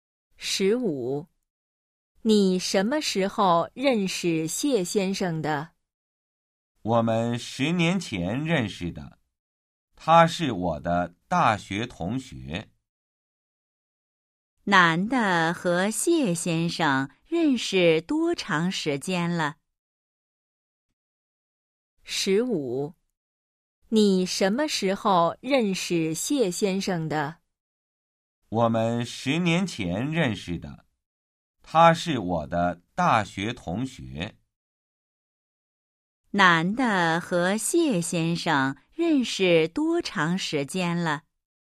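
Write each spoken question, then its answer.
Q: 男的和谢先生认识多长时间了?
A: 十年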